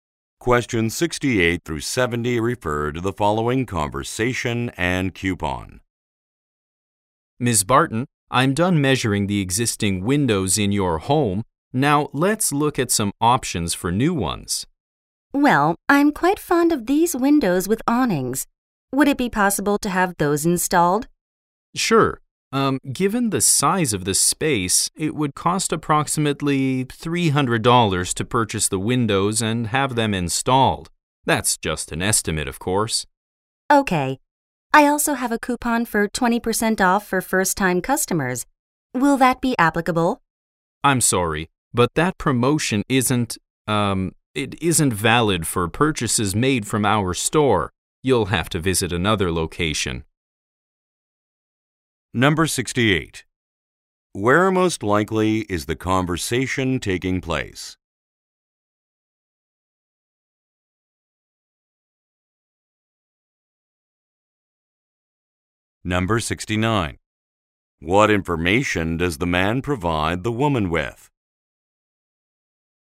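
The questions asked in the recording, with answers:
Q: Where most likely is the conversation taking place?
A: At the woman's home

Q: What information does the man provide the woman with?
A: A price estimate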